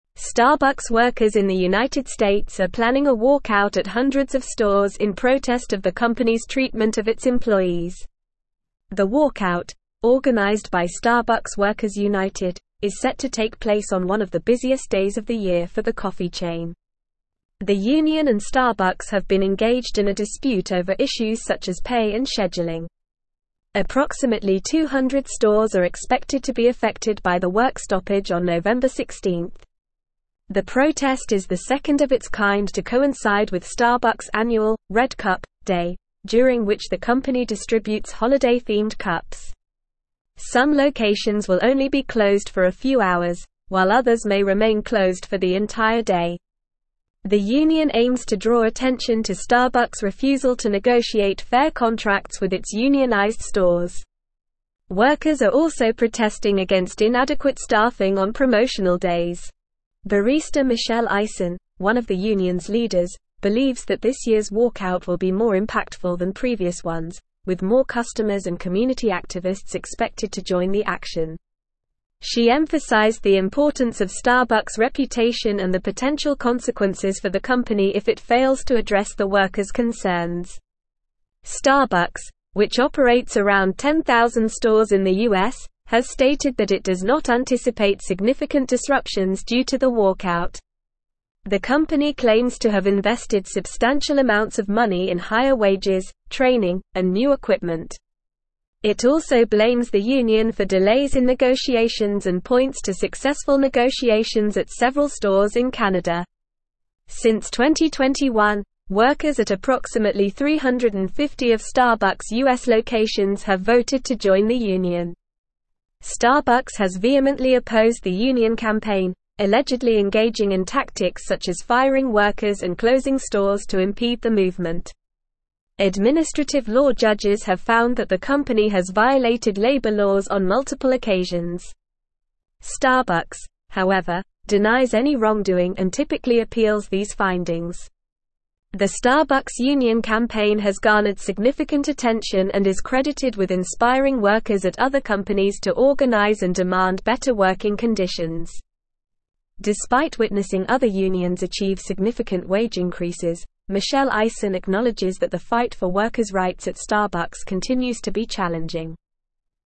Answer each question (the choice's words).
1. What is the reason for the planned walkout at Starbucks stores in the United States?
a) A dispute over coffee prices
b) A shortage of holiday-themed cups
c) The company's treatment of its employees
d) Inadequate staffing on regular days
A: The company's treatment of its employees

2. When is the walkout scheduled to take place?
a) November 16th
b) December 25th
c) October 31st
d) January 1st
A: November 16th

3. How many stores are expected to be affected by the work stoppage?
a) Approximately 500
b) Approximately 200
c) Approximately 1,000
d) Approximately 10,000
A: Approximately 200

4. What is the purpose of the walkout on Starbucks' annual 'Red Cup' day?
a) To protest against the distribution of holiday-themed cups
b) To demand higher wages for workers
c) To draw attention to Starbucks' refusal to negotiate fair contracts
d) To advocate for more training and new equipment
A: To draw attention to Starbucks' refusal to negotiate fair contracts

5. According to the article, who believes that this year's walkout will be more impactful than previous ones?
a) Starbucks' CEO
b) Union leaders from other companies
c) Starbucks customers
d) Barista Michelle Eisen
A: Barista Michelle Eisen

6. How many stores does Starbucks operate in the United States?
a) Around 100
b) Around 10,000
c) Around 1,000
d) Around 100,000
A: Around 10,000

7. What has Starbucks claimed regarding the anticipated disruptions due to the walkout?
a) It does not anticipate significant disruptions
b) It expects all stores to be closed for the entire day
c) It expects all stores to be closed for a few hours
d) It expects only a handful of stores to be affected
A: It does not anticipate significant disruptions

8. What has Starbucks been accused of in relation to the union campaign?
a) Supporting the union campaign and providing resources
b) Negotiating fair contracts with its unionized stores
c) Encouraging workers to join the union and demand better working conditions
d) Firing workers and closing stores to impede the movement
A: Firing workers and closing stores to impede the movement

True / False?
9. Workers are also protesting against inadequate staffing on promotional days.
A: True

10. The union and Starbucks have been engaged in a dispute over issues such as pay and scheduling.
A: True

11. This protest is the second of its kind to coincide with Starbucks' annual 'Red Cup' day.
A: True

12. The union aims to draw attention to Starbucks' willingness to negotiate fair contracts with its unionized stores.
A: False

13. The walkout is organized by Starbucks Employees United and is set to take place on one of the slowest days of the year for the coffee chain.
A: False

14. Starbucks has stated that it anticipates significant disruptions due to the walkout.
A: False

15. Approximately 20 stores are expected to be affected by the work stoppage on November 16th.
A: False

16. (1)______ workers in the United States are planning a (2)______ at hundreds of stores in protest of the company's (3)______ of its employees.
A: Starbucks

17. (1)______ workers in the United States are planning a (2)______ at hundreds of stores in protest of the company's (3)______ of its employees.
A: walkout

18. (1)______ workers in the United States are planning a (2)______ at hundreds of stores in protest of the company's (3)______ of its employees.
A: treatment

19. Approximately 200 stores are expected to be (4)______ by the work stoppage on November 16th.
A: affected

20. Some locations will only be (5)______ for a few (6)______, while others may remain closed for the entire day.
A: hours

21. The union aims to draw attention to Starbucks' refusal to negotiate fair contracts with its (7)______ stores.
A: unionized

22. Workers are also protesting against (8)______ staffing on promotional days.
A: inadequate

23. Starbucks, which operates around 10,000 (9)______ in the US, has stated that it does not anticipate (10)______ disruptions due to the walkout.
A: stores

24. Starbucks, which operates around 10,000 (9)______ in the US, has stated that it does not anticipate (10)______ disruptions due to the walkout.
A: significant

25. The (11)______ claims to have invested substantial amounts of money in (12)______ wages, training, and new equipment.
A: company

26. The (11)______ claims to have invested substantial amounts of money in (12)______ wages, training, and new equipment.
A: higher

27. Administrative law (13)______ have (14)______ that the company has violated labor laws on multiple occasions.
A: judges

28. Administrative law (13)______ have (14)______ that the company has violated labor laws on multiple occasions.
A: found

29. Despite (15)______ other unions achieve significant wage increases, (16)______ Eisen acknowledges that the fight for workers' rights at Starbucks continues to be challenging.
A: witnessing

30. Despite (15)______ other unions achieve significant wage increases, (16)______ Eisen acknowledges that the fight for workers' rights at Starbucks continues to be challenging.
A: Michelle

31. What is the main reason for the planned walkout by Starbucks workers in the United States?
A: The main reason for the planned walkout is the company's treatment of its employees, specifically issues related to pay and scheduling.

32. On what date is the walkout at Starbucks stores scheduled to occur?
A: The walkout is scheduled to occur on November 16th.

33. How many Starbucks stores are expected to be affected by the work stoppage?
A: Approximately 200 stores are expected to be affected by the work stoppage.

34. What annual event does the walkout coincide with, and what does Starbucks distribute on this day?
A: The walkout coincides with Starbucks' annual 'Red Cup' day, during which the company distributes holiday-themed cups.

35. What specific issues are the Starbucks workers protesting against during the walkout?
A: Workers are protesting against the company's refusal to negotiate fair contracts with unionized stores and inadequate staffing on promotional days.

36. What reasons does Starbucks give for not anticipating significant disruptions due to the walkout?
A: Starbucks claims to have invested in higher wages, training, and new equipment, and blames the union for delays in negotiations. The company also points to successful negotiations at several stores in Canada.

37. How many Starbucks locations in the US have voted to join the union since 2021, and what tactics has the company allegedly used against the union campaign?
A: Since 2021, workers at approximately 350 of Starbucks' US locations have voted to join the union. The company has allegedly engaged in tactics such as firing workers and closing stores to impede the movement.

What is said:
Starbucks workers in the United States are planning a walkout at hundreds of stores in protest of the company's treatment of its employees. The walkout, organized by Starbucks Workers United, is set to take place on one of the busiest days of the year for the coffee chain. Approximately 200 stores are expected to be affected by the work stoppage on November 16th.
The protest is the second of its kind to coincide with Starbucks' annual 'Red Cup' day, during which the company distributes holiday-themed cups. Some locations will only be closed for a few hours, while others may remain closed for the entire day. The union aims to draw attention to Starbucks' refusal to negotiate fair contracts with its unionized stores.
Barista Michelle Eisen, one of the union's leaders, believes that this year's walkout will be more impactful than previous ones, with more customers and community activists expected to join the action. She emphasized the importance of Starbucks' reputation and the potential consequences for the company if it fails to address the workers' concerns.
Starbucks, which operates around 10,000 stores in the US, has stated that it does not anticipate significant disruptions due to the walkout. The company claims to have invested substantial amounts of money in higher wages, training, and new equipment. It also blames the union for delays in negotiations and points to successful negotiations at several stores in Canada.
Since 2021, workers at approximately 350 of Starbucks' US locations have voted to join the union. Starbucks has vehemently opposed the union campaign, allegedly engaging in tactics such as firing workers and closing stores to impede the movement. Administrative law judges have found that the company has violated labor laws on multiple occasions. Starbucks, however, denies any wrongdoing and typically appeals these findings.
The Starbucks union campaign has garnered significant attention and is credited with inspiring workers at other companies to organize and demand better working conditions. Despite witnessing other unions achieve significant wage increases, Michelle Eisen acknowledges that the fight for workers' rights at Starbucks continues to be challenging.

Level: Level 4